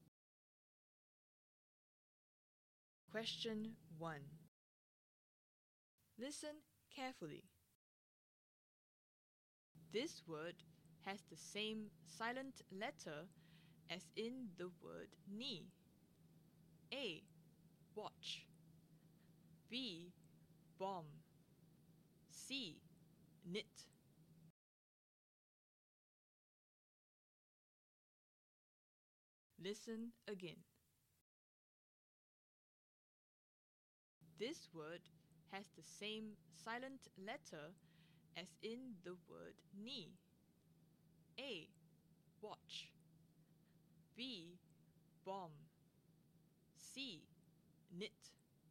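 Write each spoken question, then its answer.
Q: This word has the same silent letter as in the word knee.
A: C: Knit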